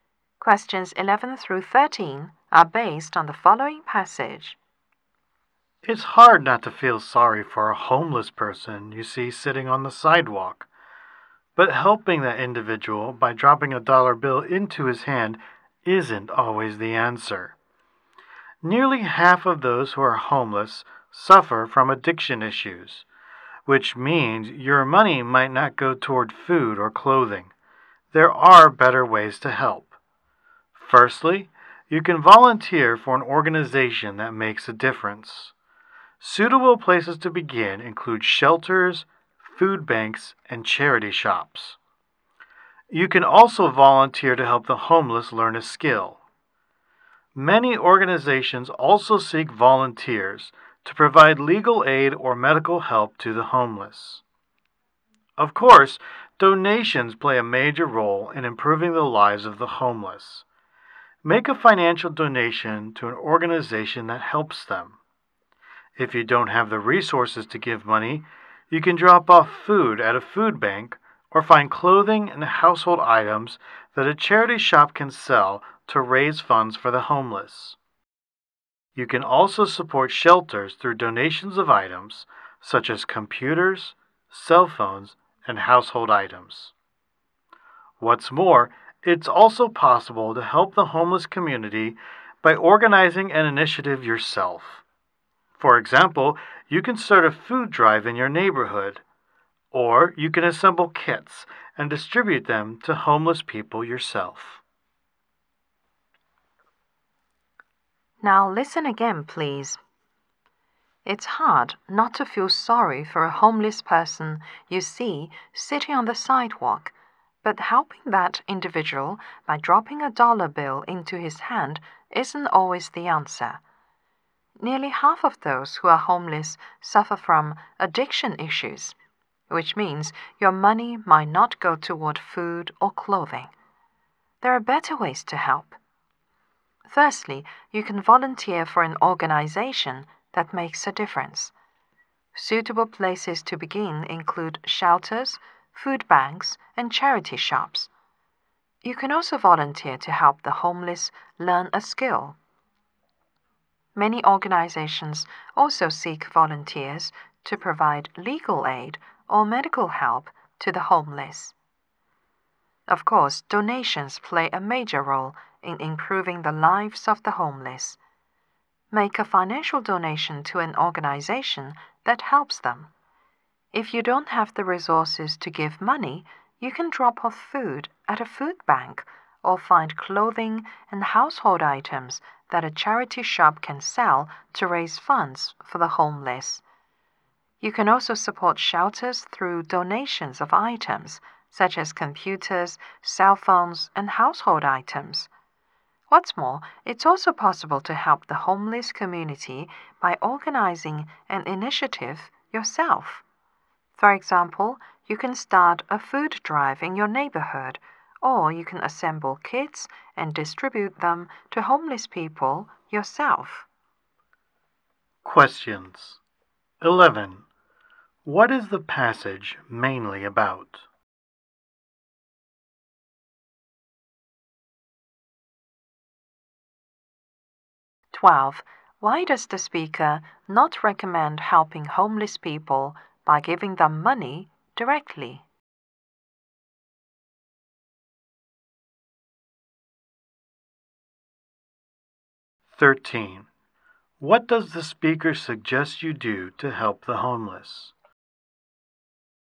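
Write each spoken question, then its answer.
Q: What is the passage mainly about?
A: Better ways to help the homeless

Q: Why does the speaker not recommend helping homeless people by giving them money directly?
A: Many have addiction issues, so the money may not go to food or clothing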